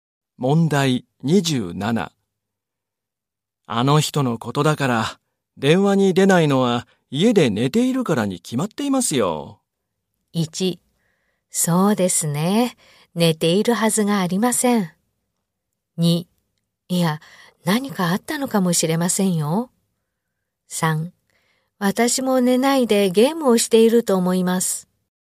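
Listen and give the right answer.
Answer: 2: いや、何かあったのかもしれませんよ。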